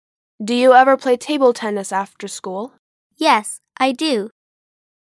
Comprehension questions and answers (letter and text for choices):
«با توجه فایل صوتی، گزینه مناسب را انتخاب کنید»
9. Does she ever play table tennis after school?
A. Yes, she does.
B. No, she doesn't.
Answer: A. Yes, she does.